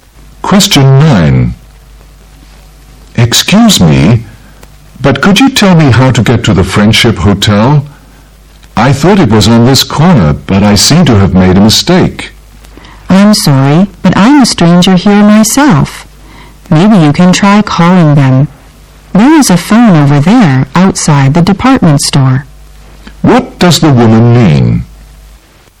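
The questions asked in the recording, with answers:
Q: What does the woman mean?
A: She doesn't know the way; he should phone the hotel.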